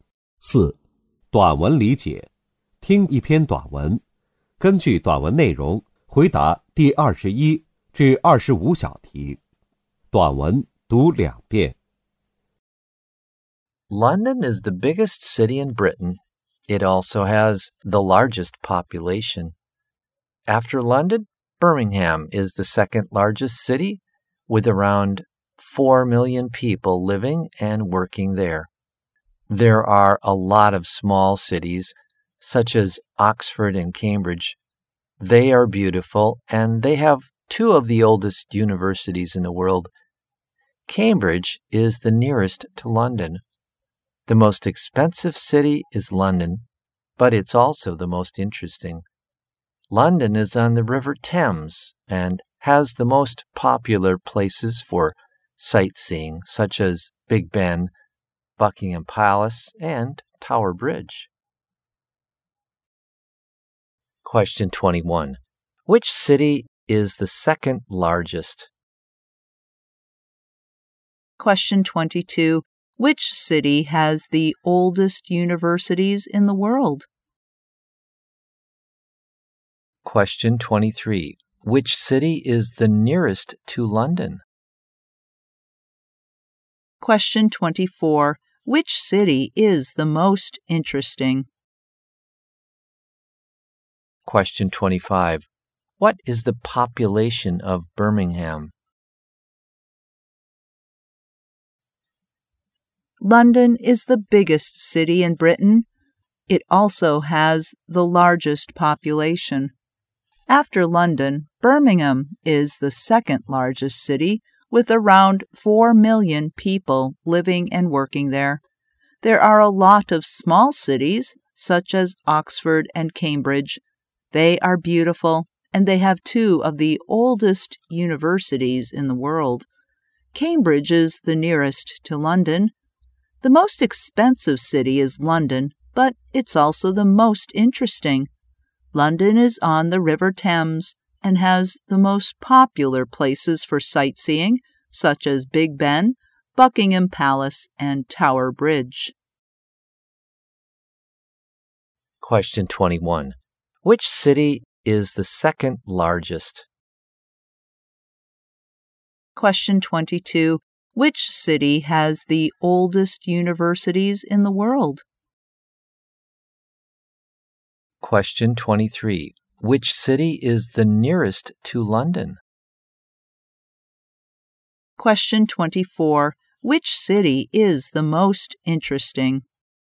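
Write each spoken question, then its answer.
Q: Question 21. Which city is the second largest?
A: Birmingham

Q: Question 22.Which city has the oldest universities in the world?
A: Oxford and Cambridge

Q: Question 23. Which city is the nearest to London?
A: Cambridge

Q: Question 24. Which city is the most interesting?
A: London

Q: Question 25. What is the population of Birmingham?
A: Around 4 million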